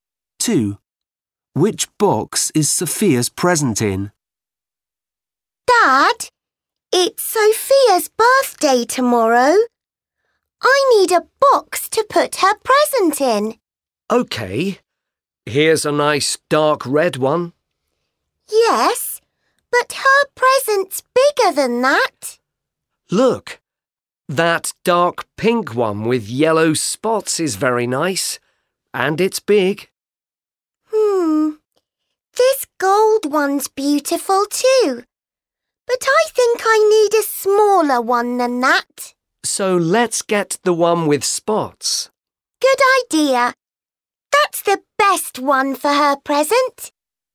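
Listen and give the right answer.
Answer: the big dark pink box with yellow spots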